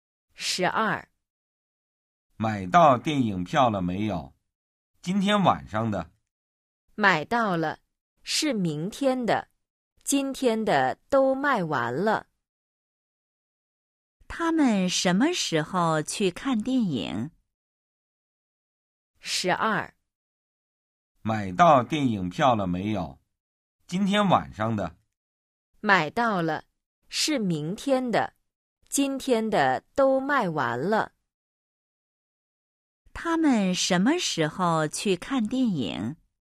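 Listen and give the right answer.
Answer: 明天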